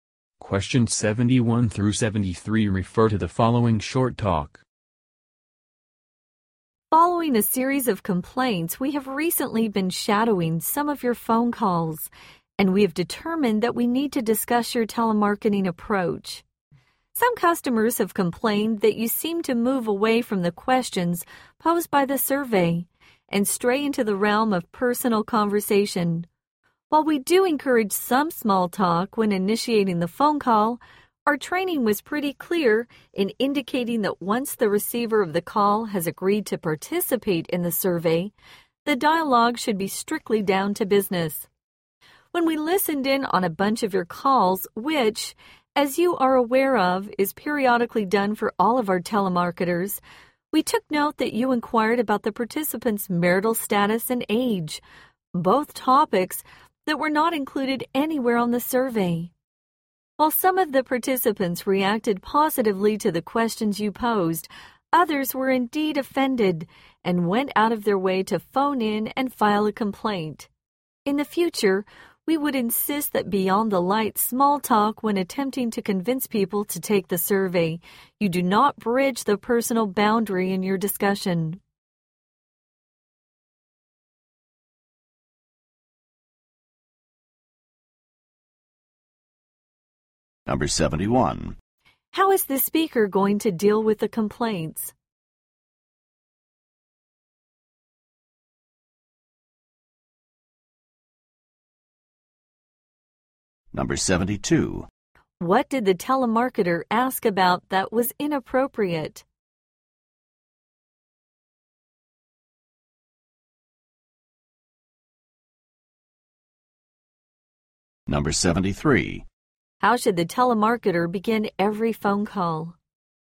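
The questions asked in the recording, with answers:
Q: What did the telemarketer ask about that was inappropriate?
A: Participants' marital status and age

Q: How should the telemarketer begin every phone call?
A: With some light small talk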